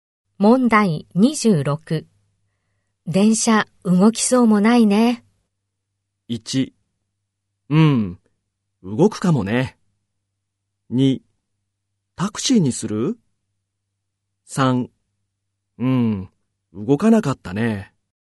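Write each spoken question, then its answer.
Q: 電車動きそうもないね。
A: 2: タクシーにする?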